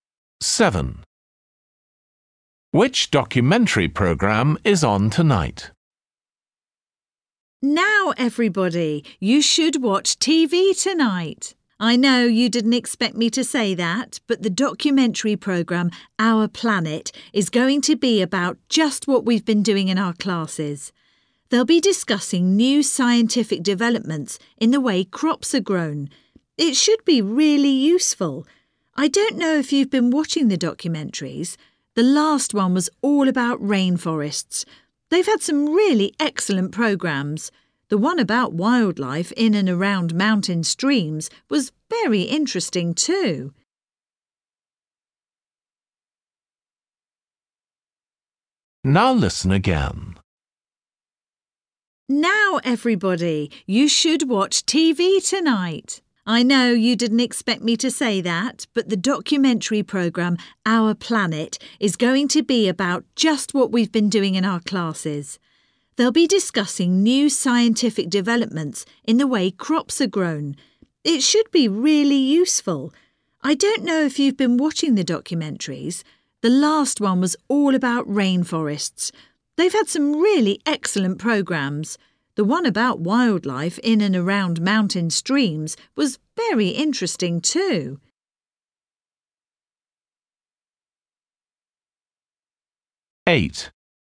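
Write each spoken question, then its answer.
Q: Which documentary program is on tonight?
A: new developments in how crops are grown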